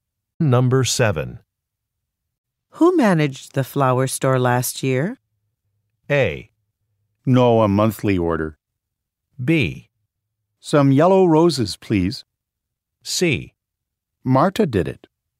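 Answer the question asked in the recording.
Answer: C: Marta did it.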